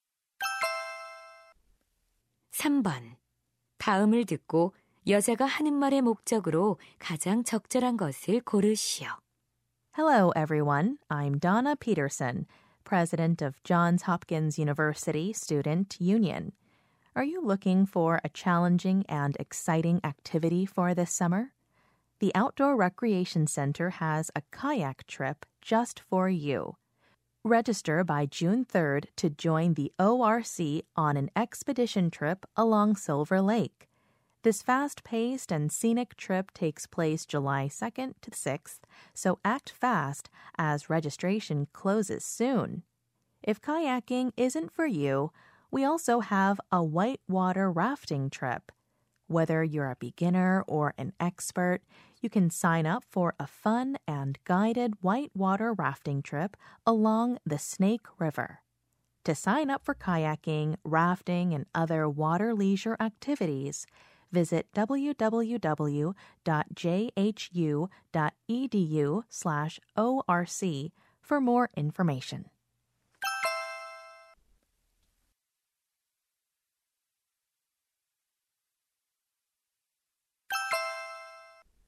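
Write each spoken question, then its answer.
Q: 다음을 듣고 여자가 하는 말의 목적으로 가장 적절한 것을 고르시오.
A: 야외 레크리에이션 센터의 카약·래프팅 여행 참가를 홍보하려고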